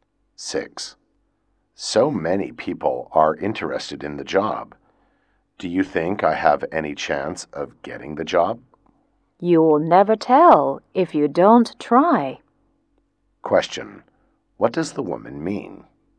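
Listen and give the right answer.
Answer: He should try for the job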